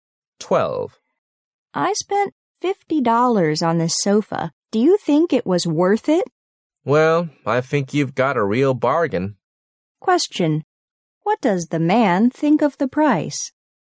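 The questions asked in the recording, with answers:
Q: What does the man think of the price?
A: It was a real bargain.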